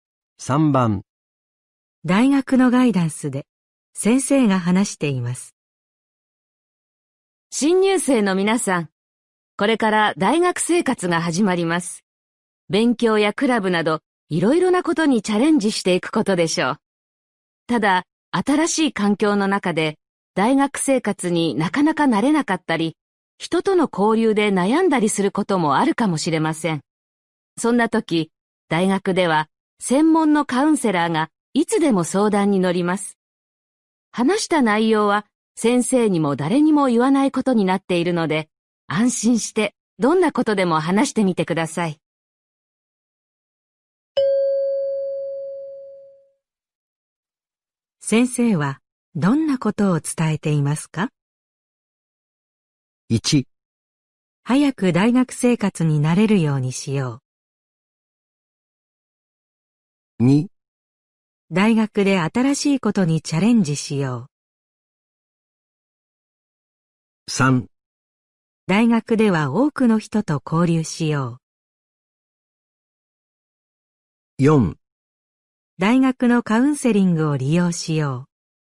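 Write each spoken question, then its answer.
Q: 先生はどんなことを伝えていますか?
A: 4: 大学のカウンセリングを利用しよう。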